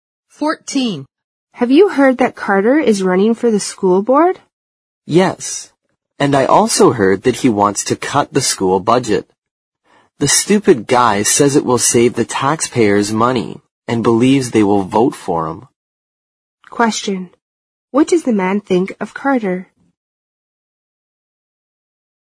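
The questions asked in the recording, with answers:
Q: What does the man think of Carter?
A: He thinks Carter is stupid and his plan to cut the school budget is foolish.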